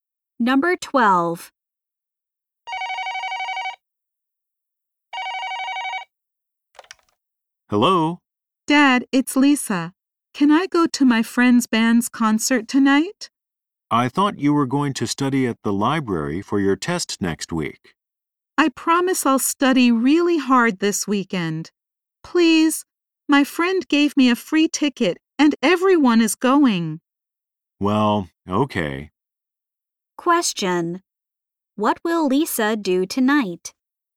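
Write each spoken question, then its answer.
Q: What will Lisa do tonight?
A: Go to her friend's band's concert.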